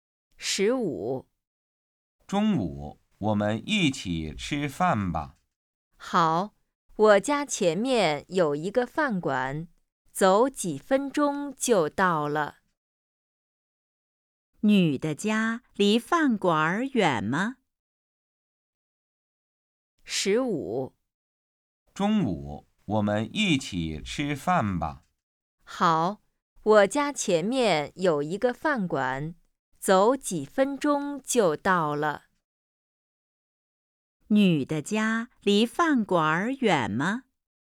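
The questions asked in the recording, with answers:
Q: 女的家离饭馆远吗?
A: 不远,走几分钟就到了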